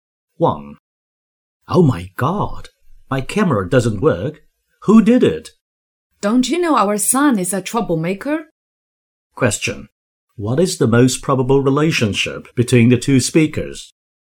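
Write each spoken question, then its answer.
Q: What is the most probable relationship between the two speakers?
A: Husband and wife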